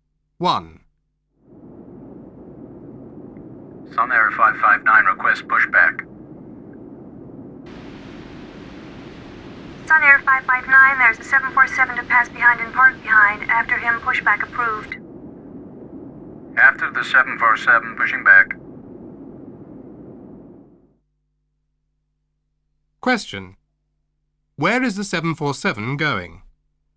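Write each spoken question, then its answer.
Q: Where is the 747 going?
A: It is passing behind to park behind.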